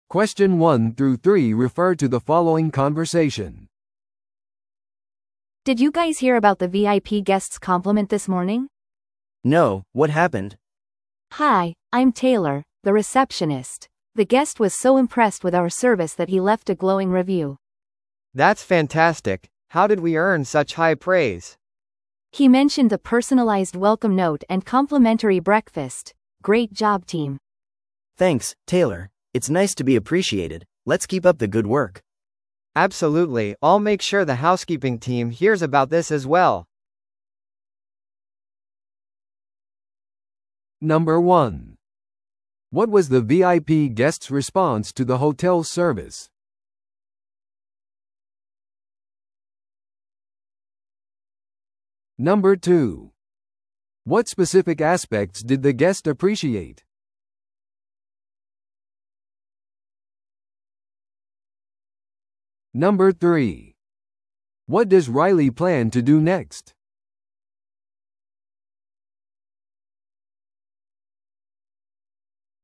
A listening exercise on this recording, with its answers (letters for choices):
Listen to the audio below and answer the questions.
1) What was the VIP guest's response to the hotel's service?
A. ゲストは正式な苦情を申し立てた。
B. ゲストは素晴らしい評価を残した。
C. ゲストは返金を要求した。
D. ゲストは追加のアメニティを要求した。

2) What specific aspects did the guest appreciate?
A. フィットネスセンターとプールエリア。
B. 専用のラウンジアクセス。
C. パーソナライズされたウェルカムノートと朝食。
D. レイトチェックアウトのオプション。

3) What does Riley plan to do next?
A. ハウスキーピングチームに褒め言葉を伝える。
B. 別のパーソナライズされたウェルカムノートを用意する。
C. VIPゲストに割引を提供する。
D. 新しいプロモーションパッケージを作る。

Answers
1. B
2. C
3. A

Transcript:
A: Did you guys hear about the VIP guest's compliment this morning?
B: No, what happened?
A: Hi, I'm Taylor, the receptionist. The guest was so impressed with our service that he left a glowing review!
C: That's fantastic! How did we earn such high praise?
A: He mentioned the personalized welcome note and complimentary breakfast. Great job team!
B: Thanks, Taylor. It's nice to be appreciated. Let's keep up the good work!
C: Absolutely, I'll make sure the housekeeping team hears about this as well.